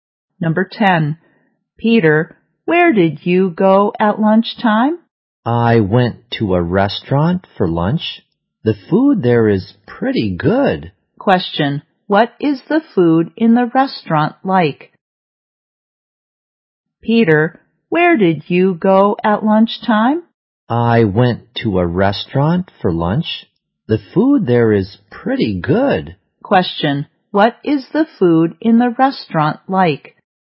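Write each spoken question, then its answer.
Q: what is the food in the restaurant like?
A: Pretty good.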